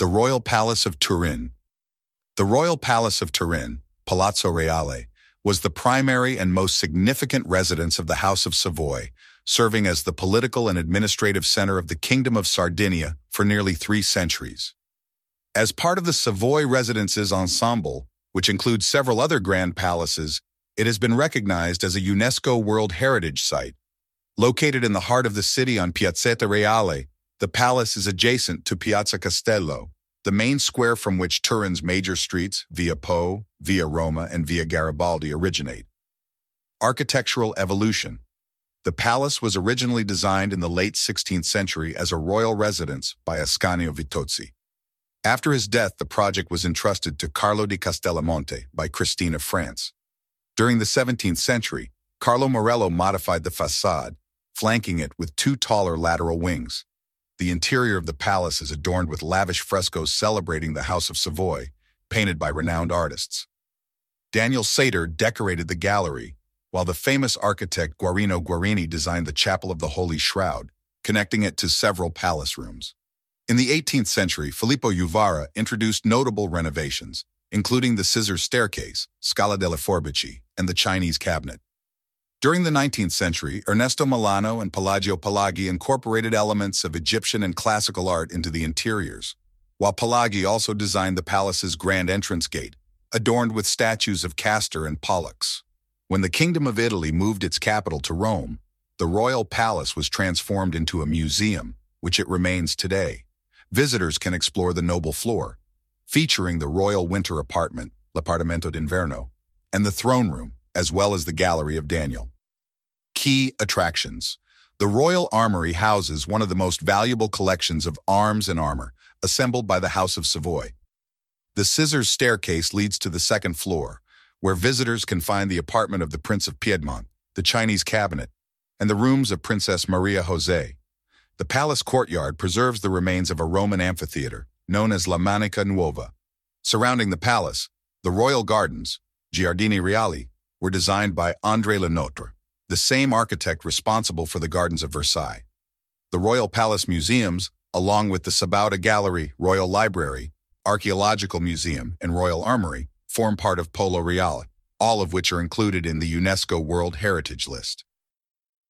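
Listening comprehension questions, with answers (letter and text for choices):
Listen to the audio about the Royal Palace and answer the questions.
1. Which royal family lived in the Royal Palace of Turin?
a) The House of Bourbon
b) The House of Savoy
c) The House of Medici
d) The House of Habsburg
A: b) The House of Savoy

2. Who designed the Chapel of the Holy Shroud inside the palace?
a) Guarino Guarini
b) Daniel Seiter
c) Filippo Juvarra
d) Carlo Morello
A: a) Guarino Guarini

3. What significant collection is housed in the Royal Armory?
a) Ancient manuscripts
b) Paintings from the Renaissance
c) Weapons and armor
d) Jewelry and royal crowns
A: c) Weapons and armor

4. Which famous architect designed the Royal Gardens of the palace?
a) Michelangelo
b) Leonardo da Vinci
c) André Le Nôtre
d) Gian Lorenzo Bernini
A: c) André Le Nôtre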